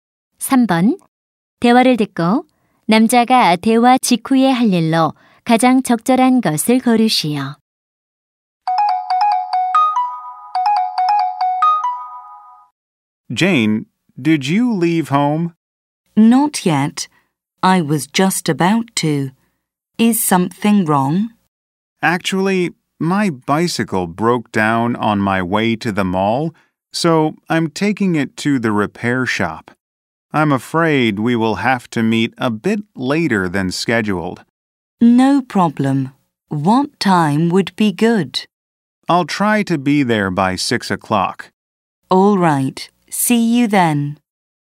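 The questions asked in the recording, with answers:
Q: 대화를 듣고 남자가 대화 직후에 할 일로 가장 적절한 것을 고르시오.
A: 자전거 수리점에 가기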